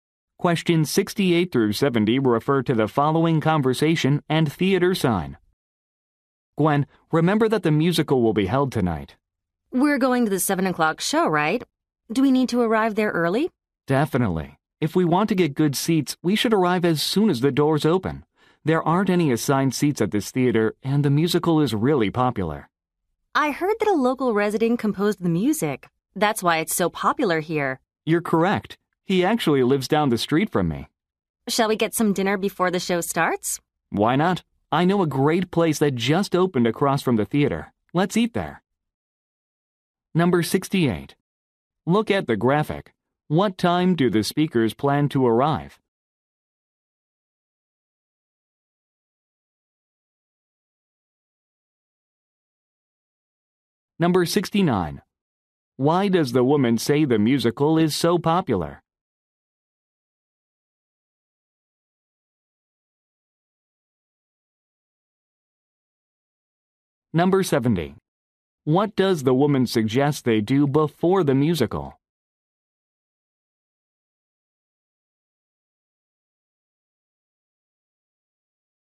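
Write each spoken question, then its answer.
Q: Why does the woman say the musical is so popular?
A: A local resident composed the music.

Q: What does the woman suggest they do before the musical?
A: Eat dinner at a new restaurant across from the theater.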